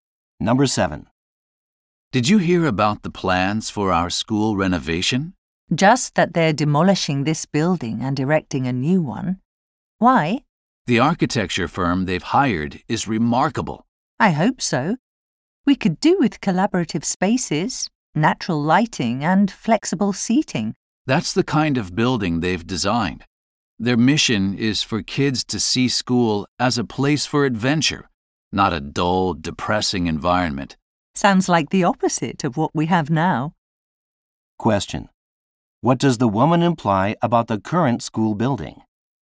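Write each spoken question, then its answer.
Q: What does the woman imply about the current school building?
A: It is dull and depressing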